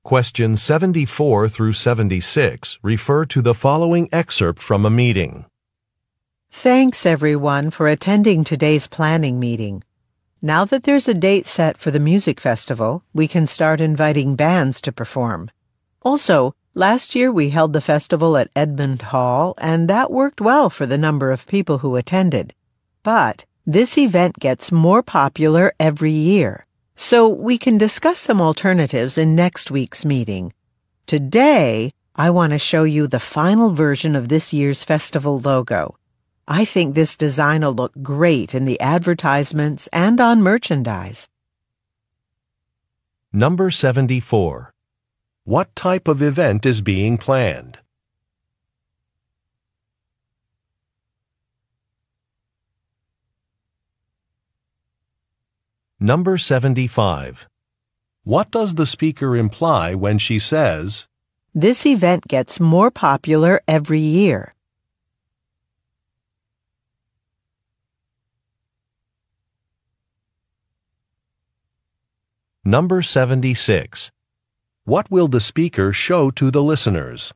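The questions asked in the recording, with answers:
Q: What type of event is being planned?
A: A music festival

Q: What does the speaker imply when she says,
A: A bigger venue may be needed

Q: What will the speaker show to the listeners?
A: The final version of the festival logo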